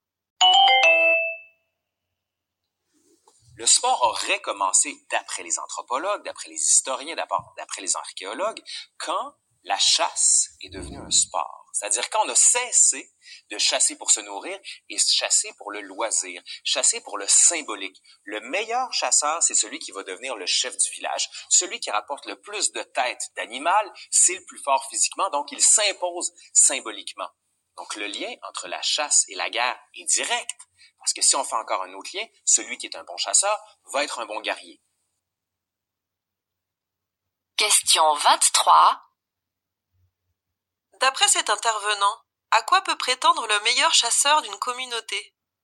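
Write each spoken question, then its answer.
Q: D'après cet intervenant, à quoi peut prétendre le meilleur chasseur d'une communauté?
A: Devenir le chef du village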